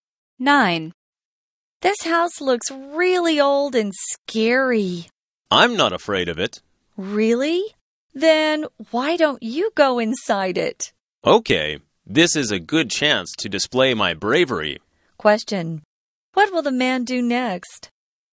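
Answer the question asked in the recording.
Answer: Go inside the house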